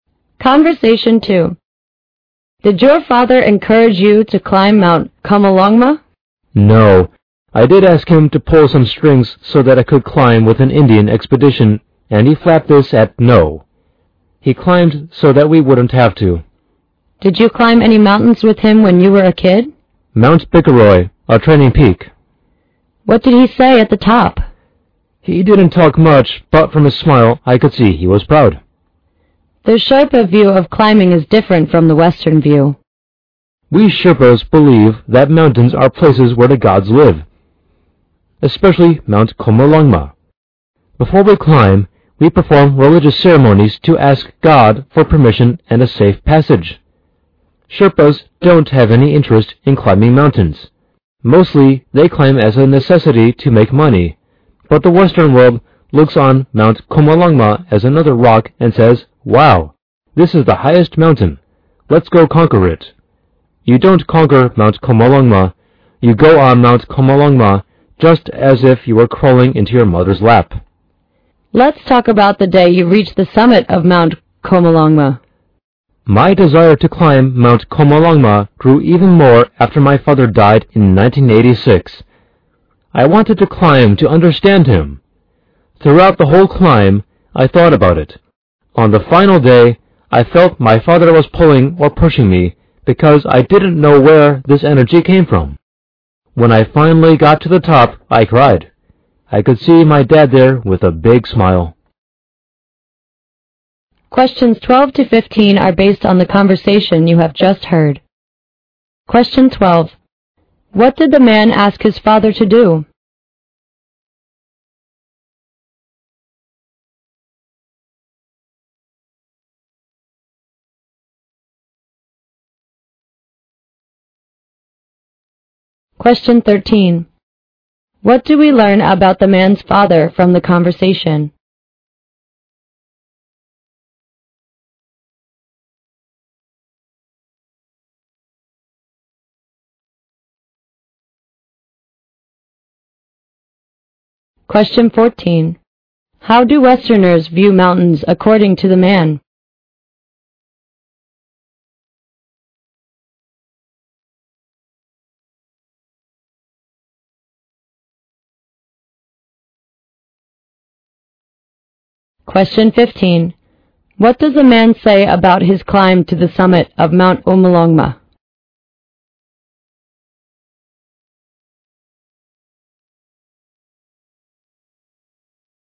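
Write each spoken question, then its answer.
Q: What did the man ask his father to do?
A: Pull some strings so he could climb with an Indian expedition

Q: How do Westerners view mountains according to the man?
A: As something to conquer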